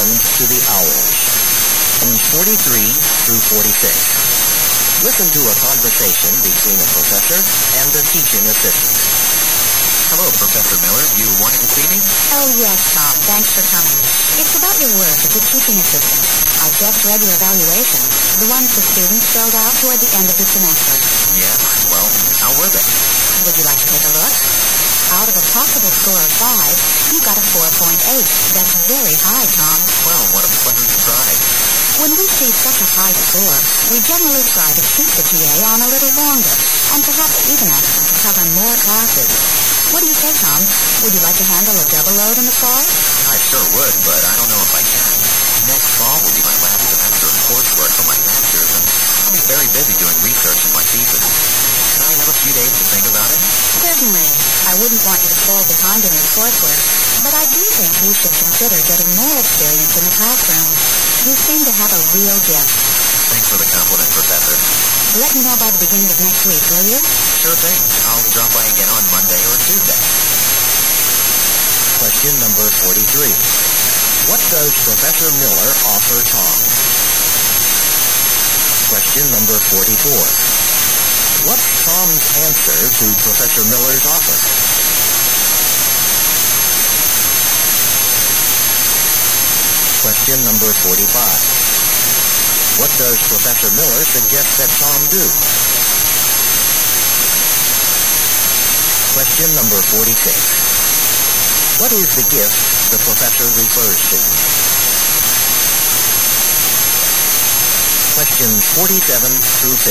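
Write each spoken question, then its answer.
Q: What does Professor Miller offer Tom?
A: A double teaching load in the fall

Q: What's Tom's answer to Professor Miller's offer?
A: He needs a few days to think about it

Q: What does Professor Miller suggest that Tom do?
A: Get more classroom experience

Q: What is the gift the professor refers to?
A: A talent for teaching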